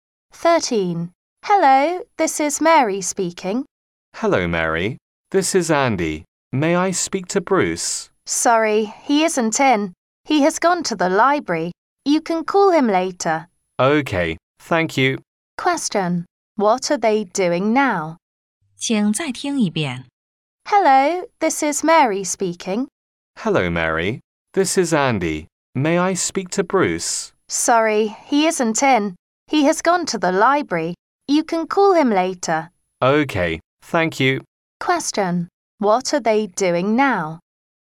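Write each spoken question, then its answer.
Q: What are they doing now?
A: Talking on the phone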